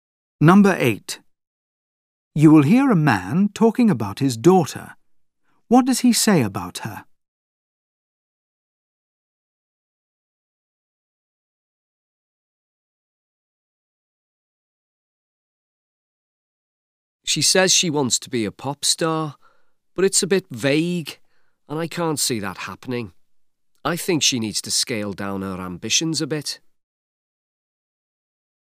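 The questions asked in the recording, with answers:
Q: What does he say about her?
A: Her ambitions are unrealistic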